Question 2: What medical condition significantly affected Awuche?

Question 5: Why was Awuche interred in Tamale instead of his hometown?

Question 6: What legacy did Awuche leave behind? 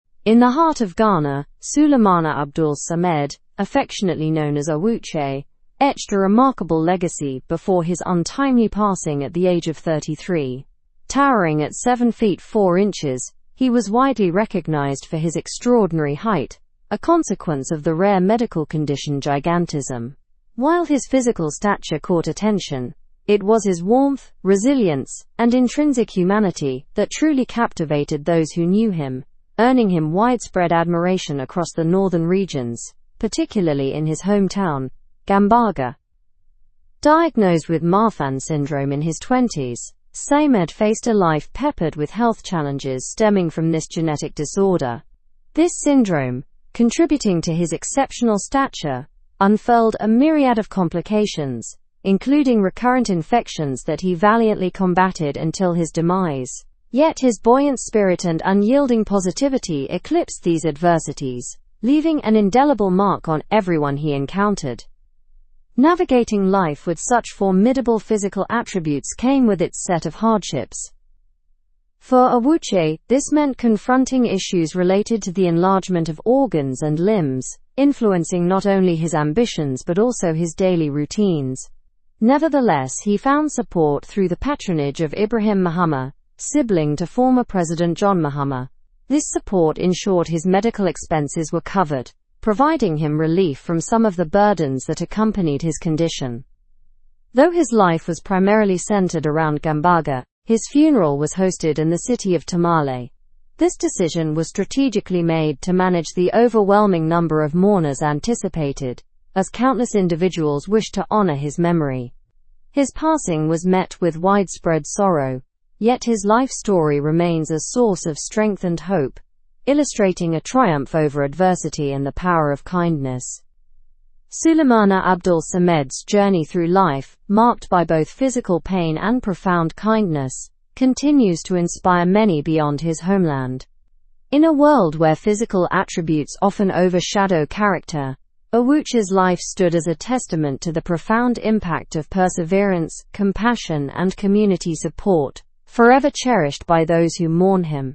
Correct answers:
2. He had gigantism due to Marfan syndrome.
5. To manage the anticipated large number of mourners.
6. He left a legacy of kindness, resilience, and inspiration.

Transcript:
In the heart of Ghana, Sulemana Abdul Samed, affectionately known as Awuche, etched a remarkable legacy before his untimely passing at the age of 33. Towering at 7 feet 4 inches, he was widely recognized for his extraordinary height, a consequence of the rare medical condition gigantism. While his physical stature caught attention, it was his warmth, resilience, and intrinsic humanity that truly captivated those who knew him, earning him widespread admiration across the Northern regions, particularly in his hometown, Gambaga.
Diagnosed with Marfan syndrome in his twenties, Samed faced a life peppered with health challenges stemming from this genetic disorder. This syndrome, contributing to his exceptional stature, unfurled a myriad of complications, including recurrent infections that he valiantly combated until his demise. Yet, his buoyant spirit and unyielding positivity eclipsed these adversities, leaving an indelible mark on everyone he encountered.
Navigating life with such formidable physical attributes came with its set of hardships. For Awuche, this meant confronting issues related to the enlargement of organs and limbs, influencing not only his ambitions but also his daily routines. Nevertheless, he found support through the patronage of Ibrahim Mahama, sibling to former President John Mahama. This support ensured his medical expenses were covered, providing him relief from some of the burdens that accompanied his condition.
Though his life was primarily centered around Gambaga, his funeral was hosted in the city of Tamale. This decision was strategically made to manage the overwhelming number of mourners anticipated, as countless individuals wished to honor his memory. His passing was met with widespread sorrow, yet his life story remains a source of strength and hope, illustrating a triumph over adversity and the power of kindness.
sorrow, yet his life story remains a source of strength and hope, illustrating a triumph over adversity and the power of kindness. Sulemana Abdul Samed's journey through life, ? by both physical pain and profound kindness, ? to inspire many beyond his homeland. In a world where physical attributes often overshadow character, Awuche's life stood as a testament to the profound impact of perseverance, compassion, and community ?, forever cherished by those who mourn him.

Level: Level 4